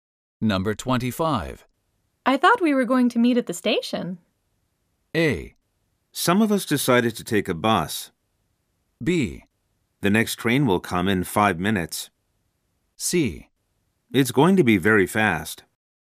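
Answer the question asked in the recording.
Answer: A: Some of us decided to take a bus.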